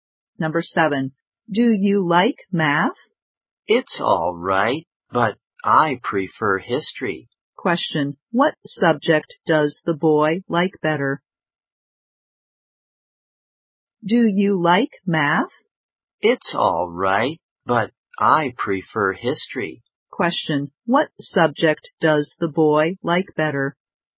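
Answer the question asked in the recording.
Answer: History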